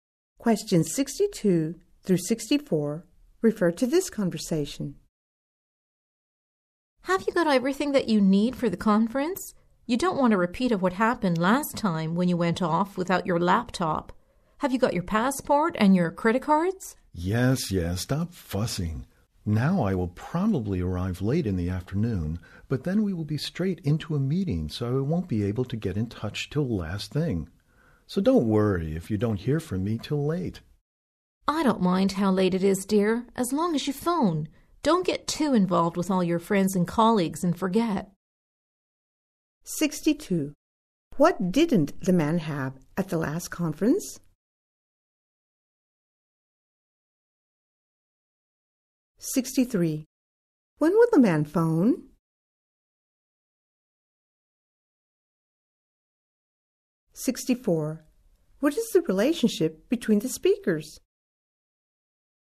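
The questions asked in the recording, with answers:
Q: What didn't the man have at the last conference?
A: His laptop

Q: When will the man phone?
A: Late, after the meeting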